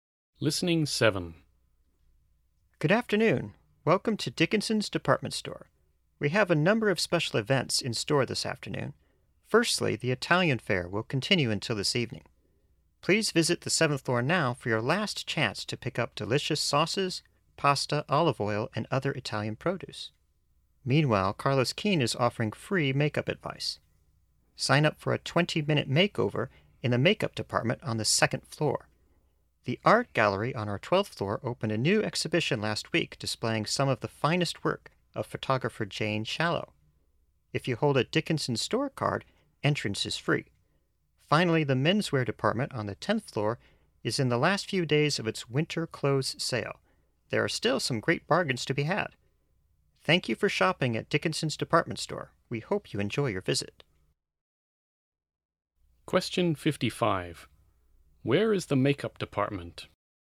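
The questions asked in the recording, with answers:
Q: Where is the makeup department?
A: On the 2nd floor.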